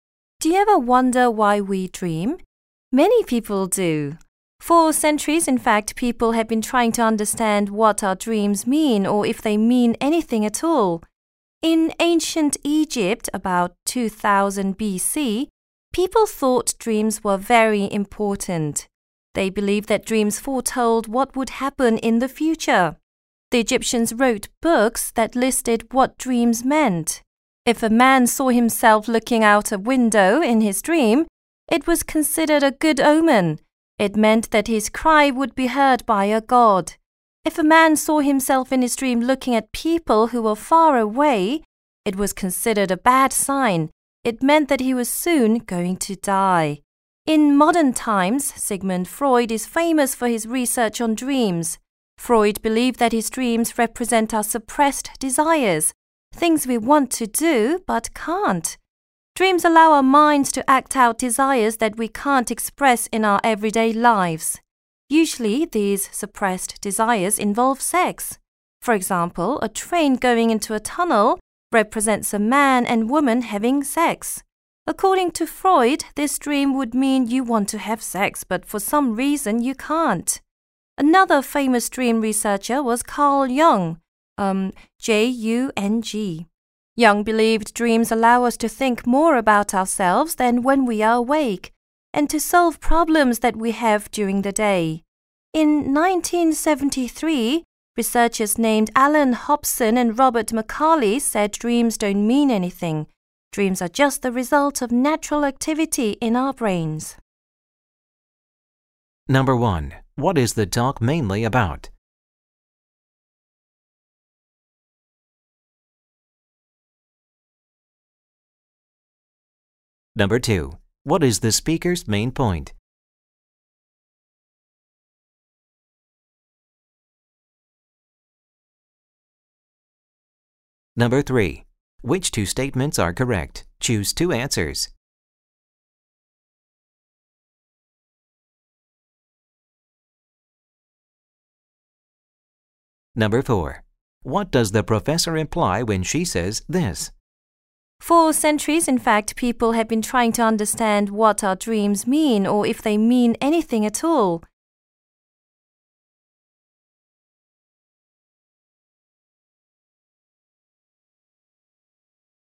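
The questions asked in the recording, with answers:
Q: What is the talk mainly about?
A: Different theories about why we dream and what dreams mean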